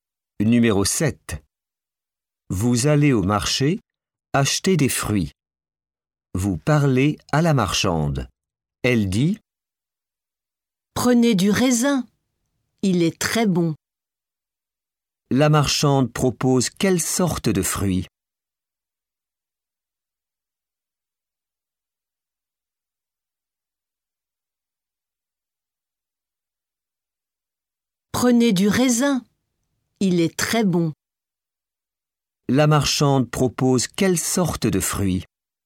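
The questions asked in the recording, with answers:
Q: La marchande propose quelle sorte de fruits?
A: Du raisin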